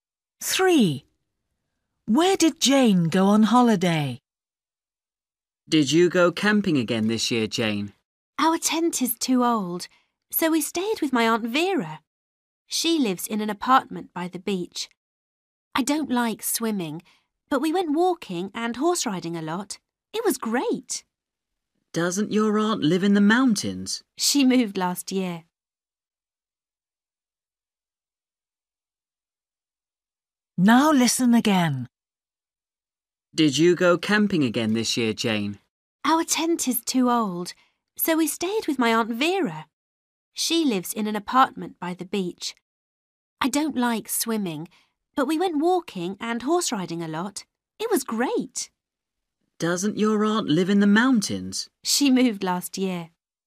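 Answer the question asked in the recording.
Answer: To her aunt's apartment by the beach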